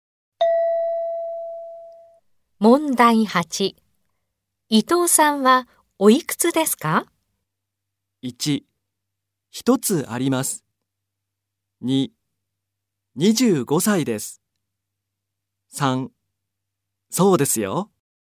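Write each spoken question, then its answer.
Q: 伊藤さんはおいくつですか?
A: 2: 25歳です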